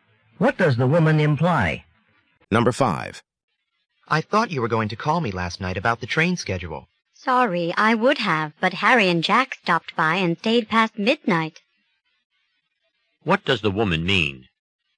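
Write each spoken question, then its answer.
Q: What does the woman mean?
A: She couldn't call because she had guests until after midnight.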